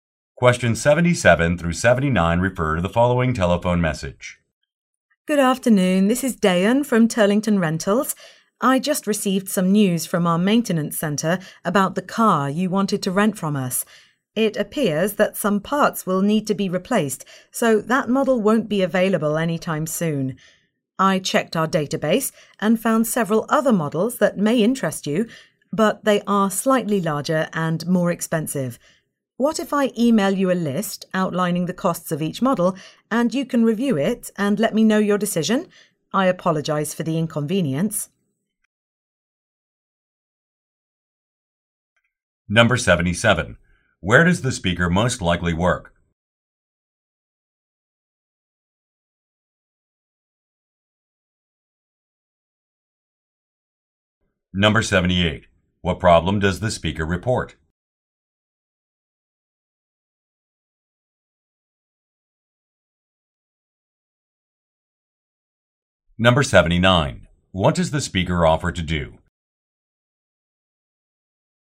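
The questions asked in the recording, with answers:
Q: Where does the speaker most likely work?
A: At a car rental company

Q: What problem does the speaker report?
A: The car needs parts replaced and won't be available

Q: What does the speaker offer to do?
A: Email a list of costs of other models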